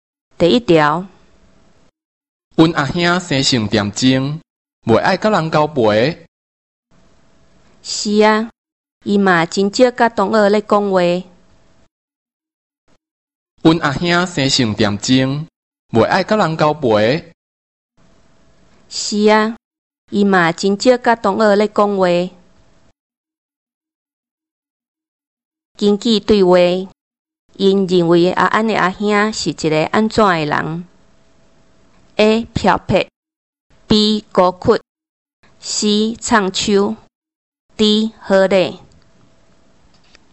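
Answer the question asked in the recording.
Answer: B: 孤僻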